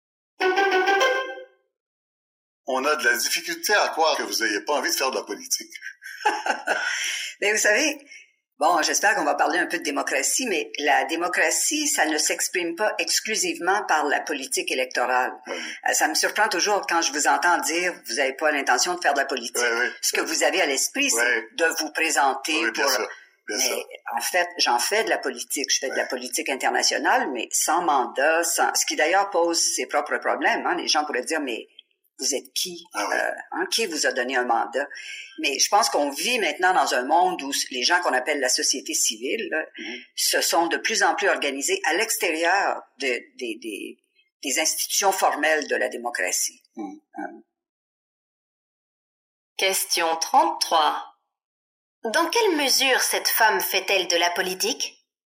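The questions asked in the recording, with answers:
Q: Dans quelle mesure cette femme fait-elle de la politique?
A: Elle fait de la politique internationale sans mandat électoral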